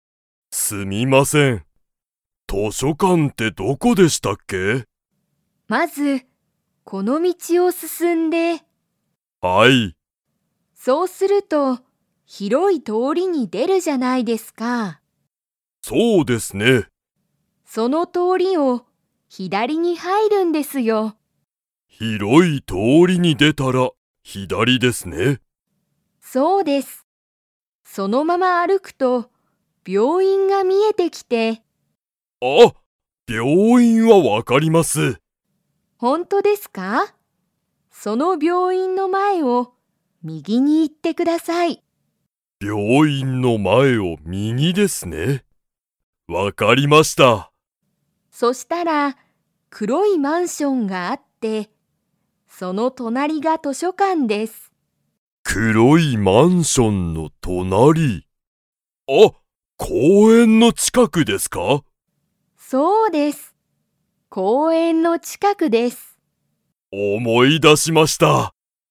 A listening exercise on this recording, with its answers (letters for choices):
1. 大西おおにしさんは、病院びょういんの場所ばしょを知しっていますか?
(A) はい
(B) いいえ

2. マンションの隣となりに図書館としょかんがある。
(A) 大おおきい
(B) 可愛かわいい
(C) 古ふるい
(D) 黒くろい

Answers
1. A
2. D

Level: Level 4